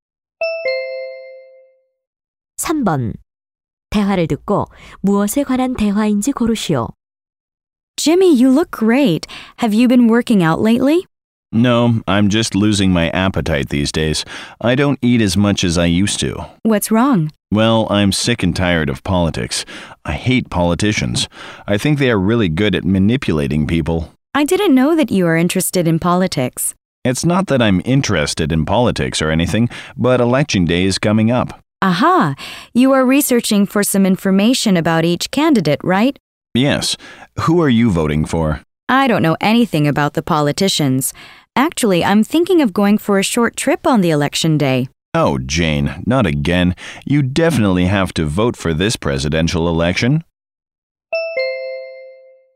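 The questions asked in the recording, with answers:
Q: 대화를 듣고 무엇에 관한 대화인지 고르시오.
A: 대통령 선거 투표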